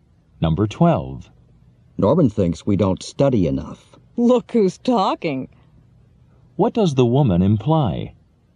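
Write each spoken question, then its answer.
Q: What does the woman imply?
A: Norman doesn't study enough himself.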